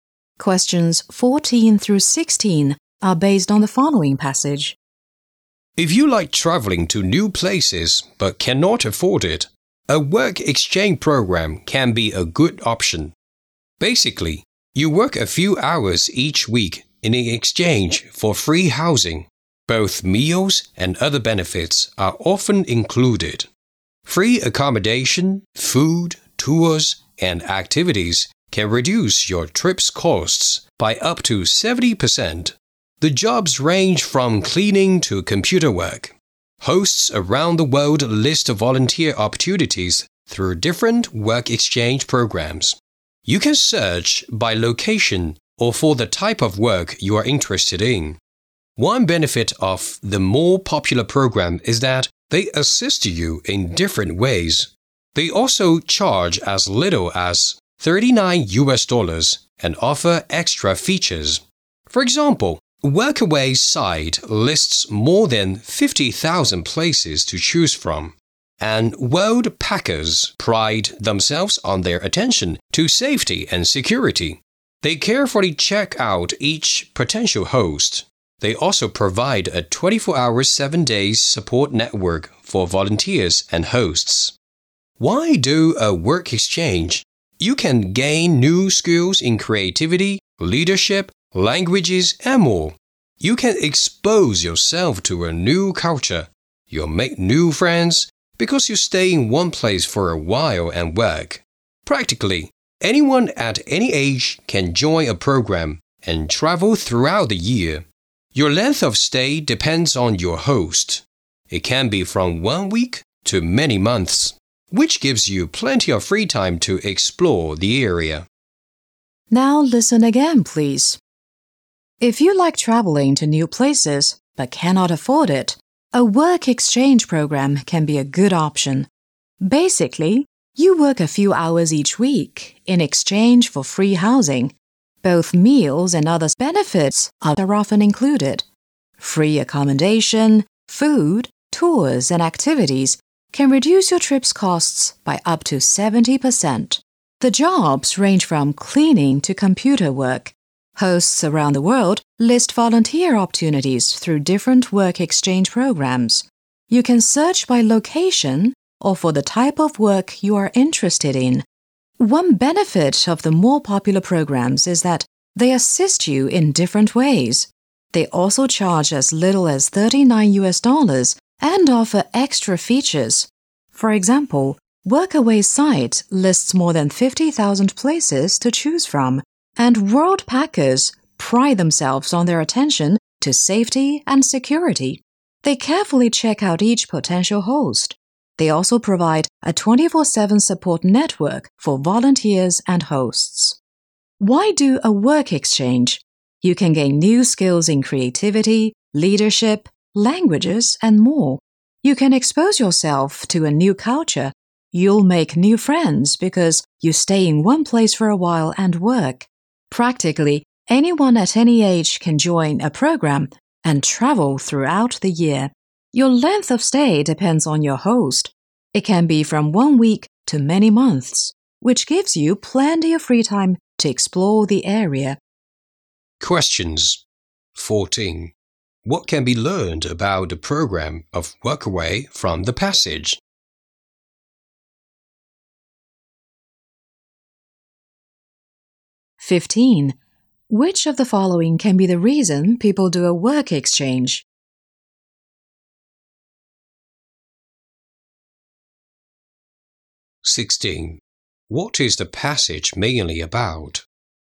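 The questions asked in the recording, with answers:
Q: What can be learned about the program of Workaway from the passage?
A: Its site lists more than 50,000 places to choose from

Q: What is the passage mainly about?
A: Work exchange programs as a cheap way to travel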